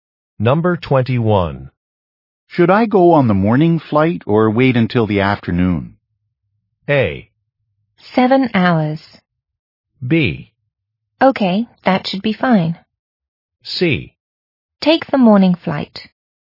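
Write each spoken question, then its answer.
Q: Should I go on the morning flight or wait until the afternoon?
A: C: Take the morning flight.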